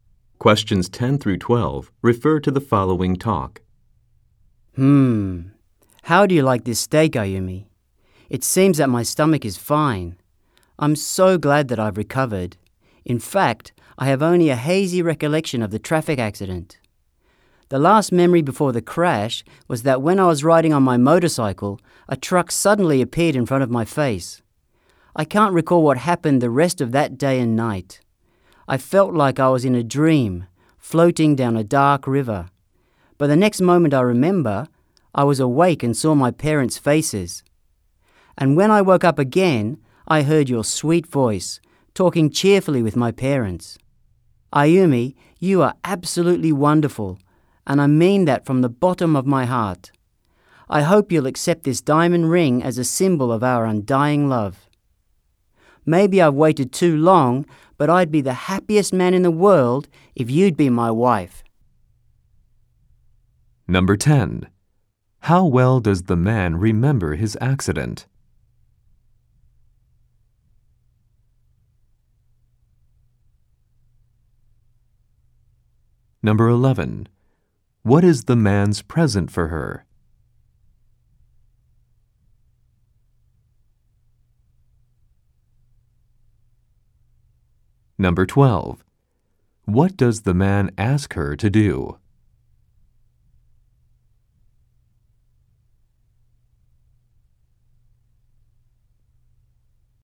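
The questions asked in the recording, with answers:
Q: How well does the man remember his accident?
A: Only vaguely; he remembers a truck suddenly appearing in front of him

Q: What is the man's present for her?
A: A diamond ring

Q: What does the man ask her to do?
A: Marry him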